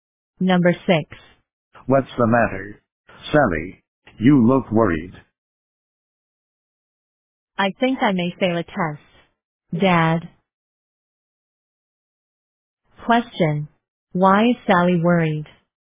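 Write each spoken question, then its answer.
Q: Why is Sally worried?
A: She thinks she may fail a test.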